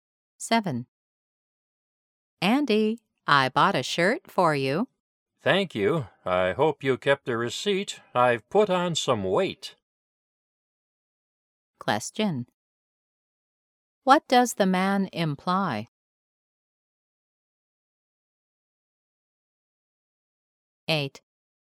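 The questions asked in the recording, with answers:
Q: What does the man imply?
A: The shirt may be too small and need exchanging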